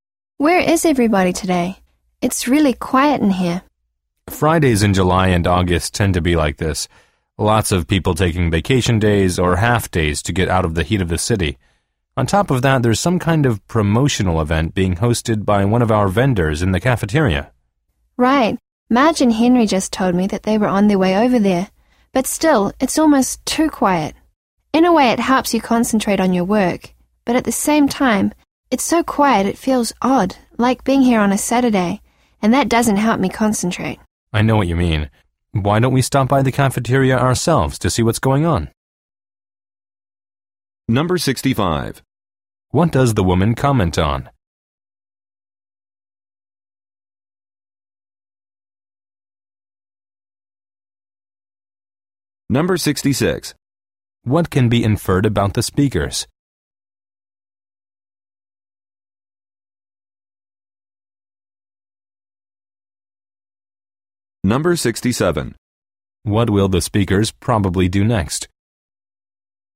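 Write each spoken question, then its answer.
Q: What will the speakers probably do next?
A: Go to the cafeteria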